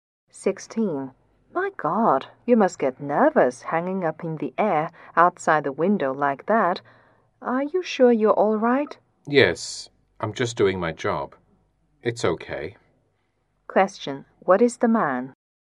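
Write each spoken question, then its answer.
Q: What is the man?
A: A window cleaner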